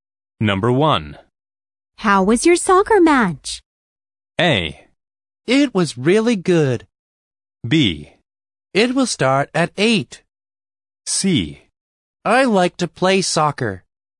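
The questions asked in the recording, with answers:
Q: How was your soccer match?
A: A: It was really good.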